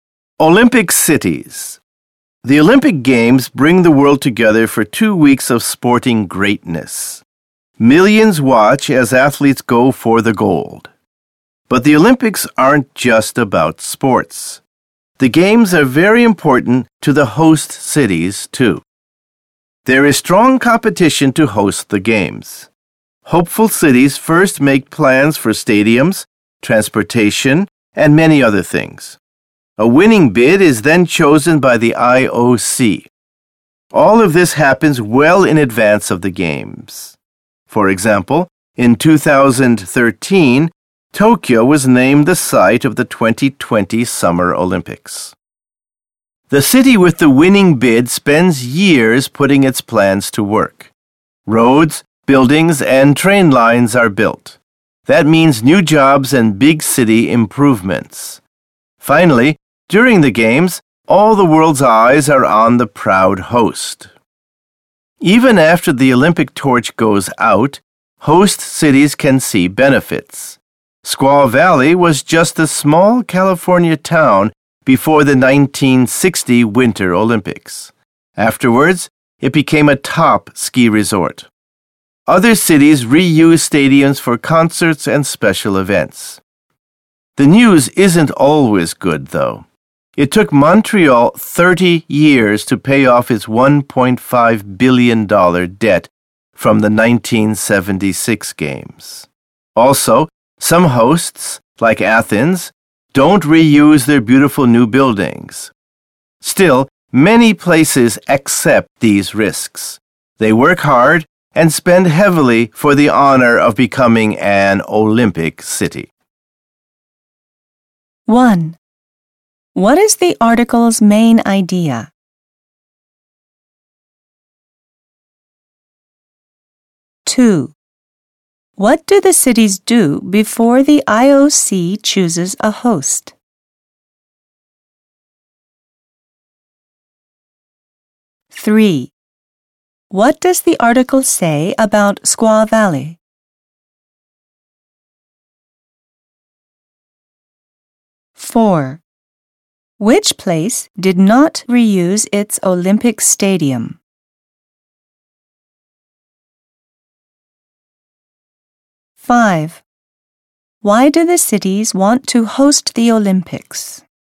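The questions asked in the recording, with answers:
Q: What do the cities do before the IOC chooses a host?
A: They make plans for stadiums, transportation, and other things

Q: What does the article say about Squaw Valley?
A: It was a small town that became a top ski resort after the 1960 Winter Olympics

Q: Which place did not reuse its Olympic stadium?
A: Athens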